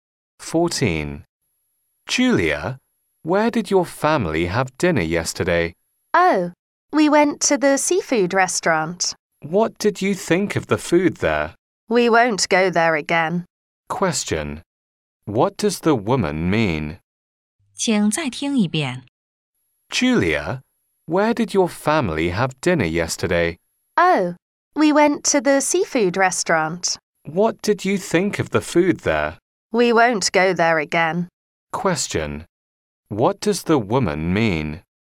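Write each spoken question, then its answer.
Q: What does the woman mean?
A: She didn't like the food there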